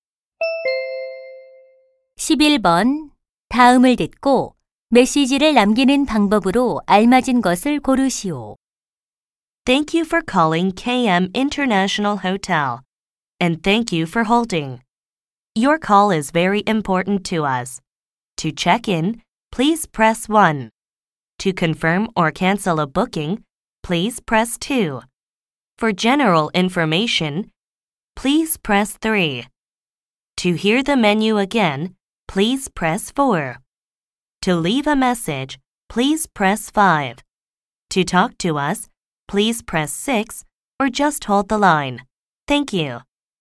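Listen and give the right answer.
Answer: 5번 누르기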